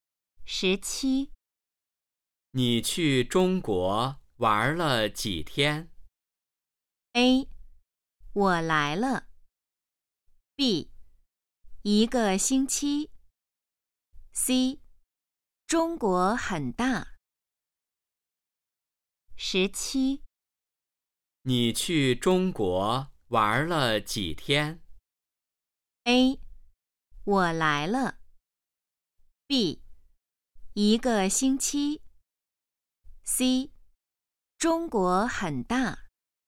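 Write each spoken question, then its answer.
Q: 你去中国玩了几天?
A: B: 一个星期。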